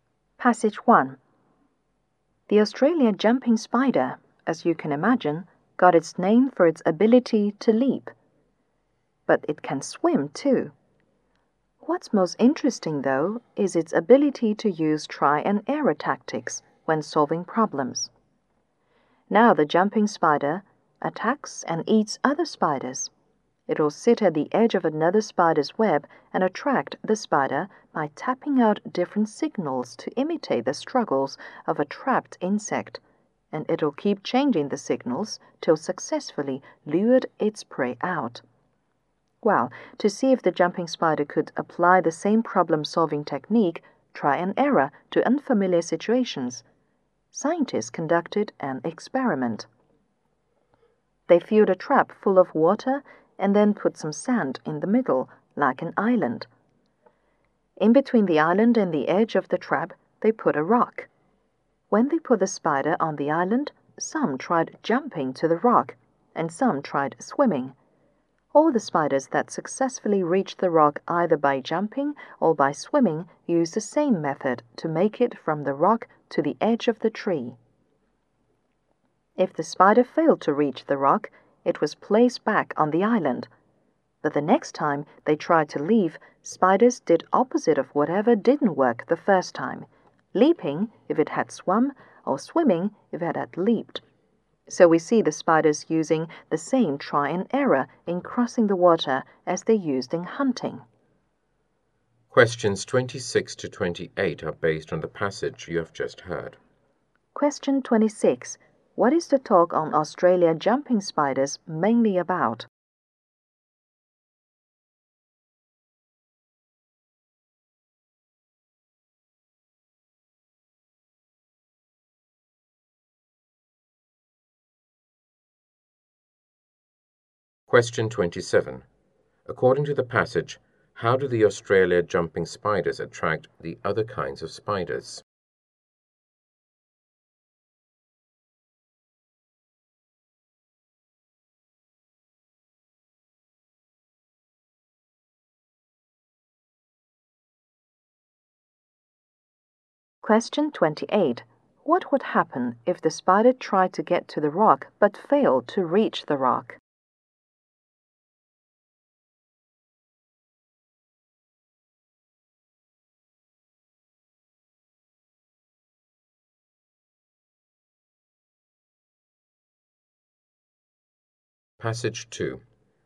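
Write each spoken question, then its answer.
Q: What is the talk on Australia jumping spiders mainly about?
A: Their use of trial and error to solve problems

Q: According to the passage, how do the Australia jumping spiders attract the other kinds of spiders?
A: By tapping signals on the web that imitate a trapped insect

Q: What would happen if the spider tried to get to the rock but failed to reach the rock?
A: Next time it would try the opposite method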